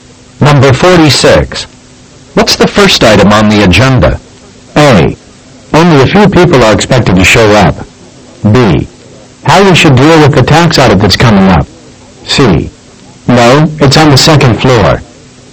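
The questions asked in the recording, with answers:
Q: What's the first item on the agenda?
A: B: How we should deal with the tax audit that's coming up.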